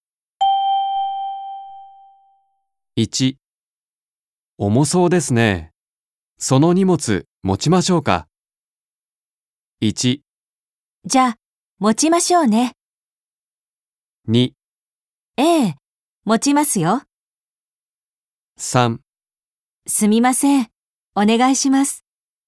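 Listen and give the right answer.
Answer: 3: すみません、お願いします。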